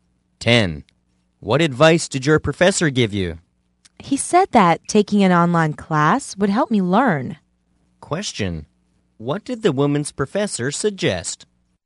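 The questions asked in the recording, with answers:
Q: What did the woman's professor suggest?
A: Taking an online class.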